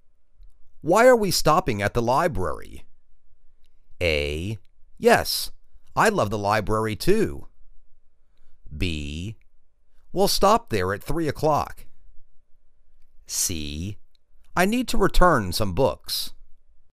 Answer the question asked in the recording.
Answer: I need to return some books.